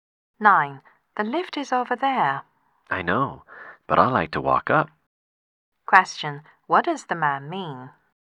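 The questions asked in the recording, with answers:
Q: What does the man mean?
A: He prefers to take the stairs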